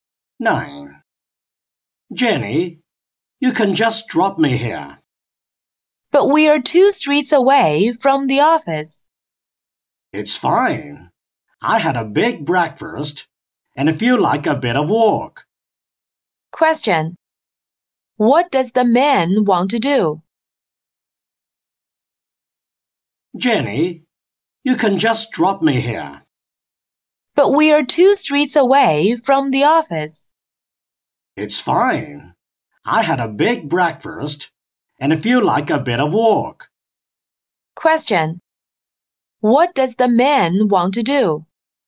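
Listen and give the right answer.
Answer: Walk to the office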